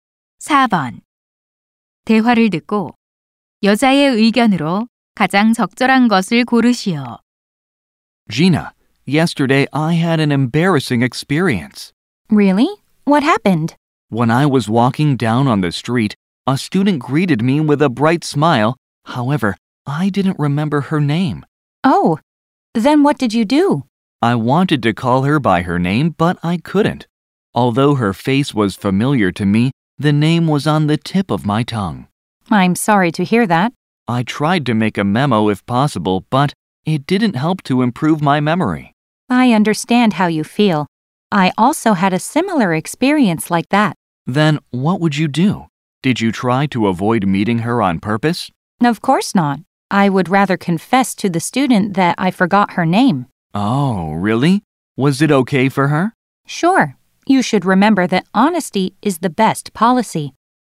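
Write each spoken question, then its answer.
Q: 대화를 듣고 여자의 의견으로 가장 적절한 것을 고르시오.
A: 이름을 잊었으면 솔직하게 말하는 것이 최선이다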